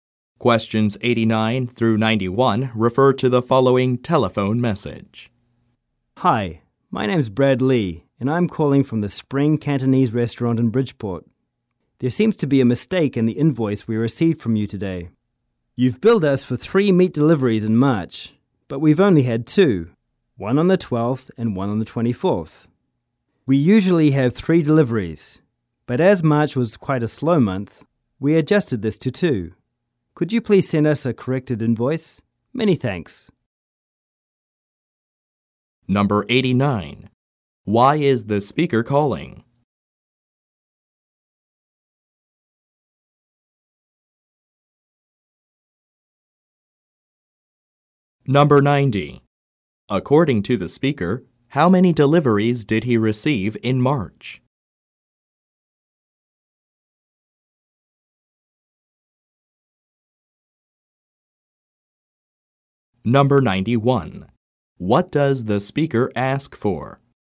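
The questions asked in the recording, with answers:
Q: Why is the speaker calling?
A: To report a mistake in an invoice

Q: According to the speaker, how many deliveries did he receive in March?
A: Two

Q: What does the speaker ask for?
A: A corrected invoice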